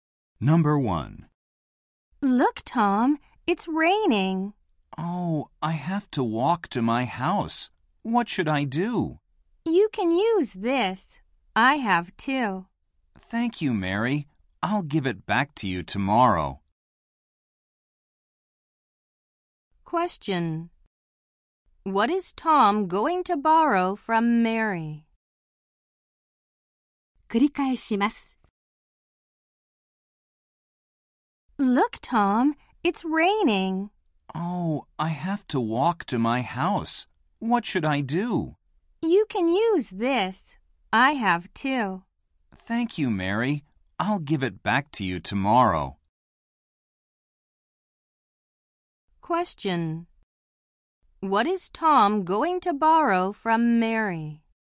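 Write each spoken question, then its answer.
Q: What is Tom going to borrow from Mary?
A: An umbrella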